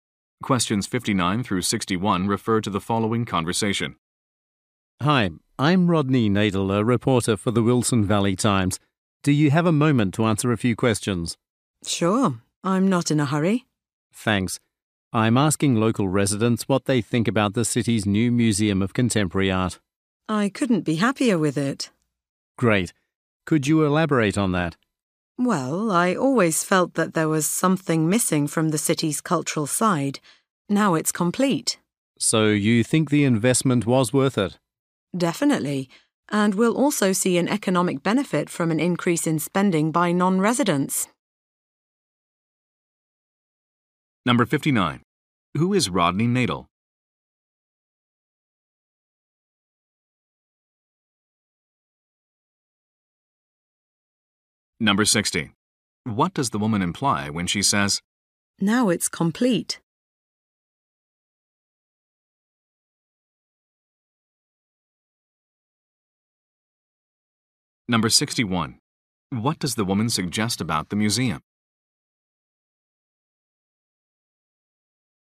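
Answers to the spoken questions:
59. A reporter for the Wilson Valley Times
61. It will bring in spending by non-residents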